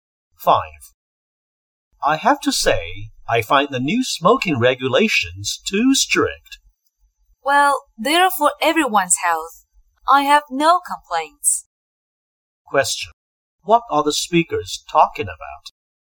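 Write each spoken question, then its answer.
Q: What are the speakers talking about?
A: The new smoking regulations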